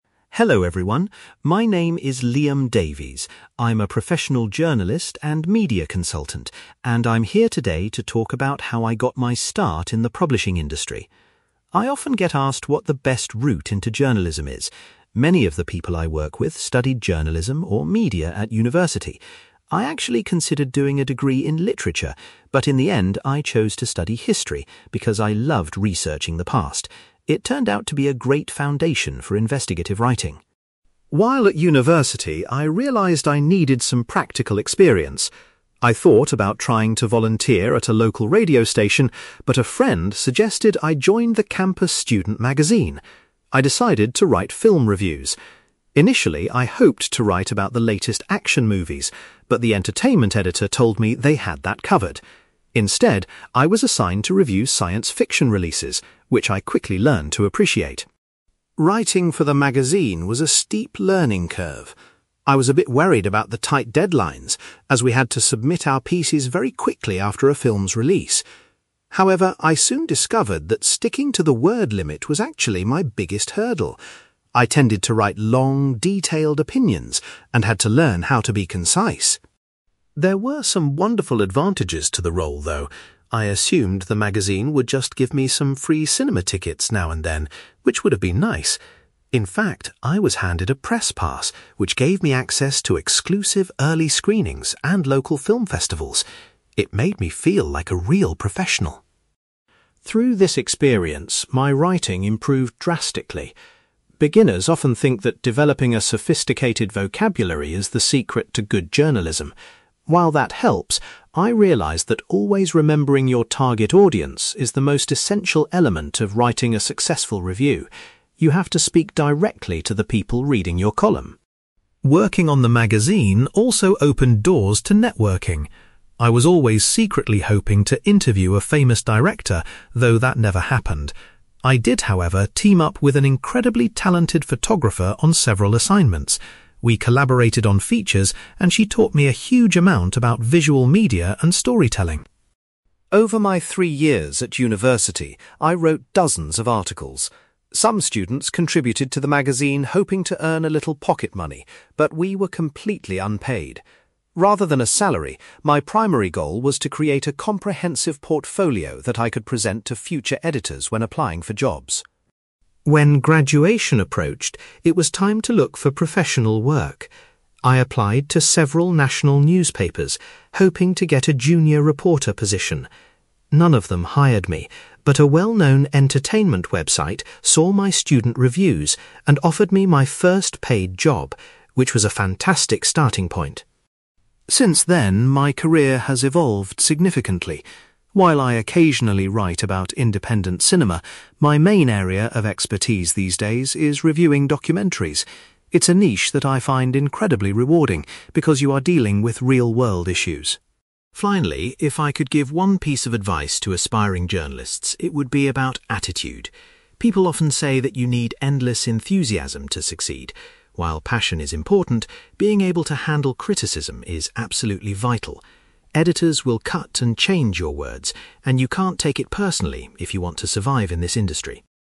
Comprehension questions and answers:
You will hear a journalist called Liam Davies talking about how writing for a student magazine helped launch his career. For questions 9-18, complete the sentences with a word or short phrase.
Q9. Liam decided to take a degree in (9)........................... rather than literature.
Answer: history

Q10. Liam was asked to write reviews of (10)........................... films for the student magazine.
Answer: science fiction

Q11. Liam found that keeping to the (11)........................... was the most difficult aspect of writing his reviews.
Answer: word limit

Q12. Liam was thrilled to be given a (12)........................... to attend special film screenings.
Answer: press pass

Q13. Liam says that thinking about the (13)........................... is the key to writing a good article.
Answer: target audience

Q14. Liam learned a lot while working alongside a (14)........................... from the magazine.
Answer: photographer

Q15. Liam's main motivation for writing the reviews was to build up a (15)........................... of his work.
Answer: portfolio

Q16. Liam's first professional journalism job was working for a (16)........................... .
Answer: website

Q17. In his current job, Liam focuses entirely on writing about (17)........................... .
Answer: documentaries

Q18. Liam advises young journalists to be prepared to accept (18)........................... from their editors.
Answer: criticism

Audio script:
Liam: Hello everyone, my name is Liam Davies. I'm a professional journalist and media consultant, and I'm here today to talk about how I got my start in the publishing industry. I often get asked what the best route into journalism is. Many of the people I work with studied journalism or media at university. I actually considered doing a degree in literature, but in the end, I chose to study history because I loved researching the past. It turned out to be a great foundation for investigative writing.
While at university, I realised I needed some practical experience. I thought about trying to volunteer at a local radio station, but a friend suggested I join the campus student magazine. I decided to write film reviews. Initially, I hoped to write about the latest action movies, but the entertainment editor told me they had that covered. Instead, I was assigned to review science fiction releases, which I quickly learned to appreciate.
Writing for the magazine was a steep learning curve. I was a bit worried about the tight deadlines, as we had to submit our pieces very quickly after a film's release. However, I soon discovered that sticking to the word limit was actually my biggest hurdle. I tended to write long, detailed opinions and had to learn how to be concise!
There were some wonderful advantages to the role, though. I assumed the magazine would just give me some free cinema tickets now and then, which would have been nice. In fact, I was handed a press pass, which gave me access to exclusive early screenings and local film festivals. It made me feel like a real professional.
Through this experience, my writing improved drastically. Beginners often think that developing a sophisticated vocabulary is the secret to good journalism. While that helps, I realised that always remembering your target audience is the most essential element of writing a successful review. You have to speak directly to the people reading your column.
Working on the magazine also opened doors to networking. I was always secretly hoping to interview a famous director, though that never happened! I did, however, team up with an incredibly talented photographer on several assignments. We collaborated on features, and she taught me a huge amount about visual media and storytelling.
Over my three years at university, I wrote dozens of articles. Some students contributed to the magazine hoping to earn a little pocket money, but we were completely unpaid. Rather than a salary, my primary goal was to create a comprehensive portfolio that I could present to future editors when applying for jobs.
When graduation approached, it was time to look for professional work. I applied to several national newspapers, hoping to get a junior reporter position. None of them hired me, but a well-known entertainment website saw my student reviews and offered me my first paid job, which was a fantastic starting point.
Since then, my career has evolved significantly. While I occasionally write about independent cinema, my main area of expertise these days is reviewing documentaries. It's a niche that I find incredibly rewarding because you are dealing with real-world issues.
Finally, if I could give one piece of advice to aspiring journalists, it would be about attitude. People often say that you need endless enthusiasm to succeed. While passion is important, being able to handle criticism is absolutely vital. Editors will cut and change your words, and you can't take it personally if you want to survive in this industry.

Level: B2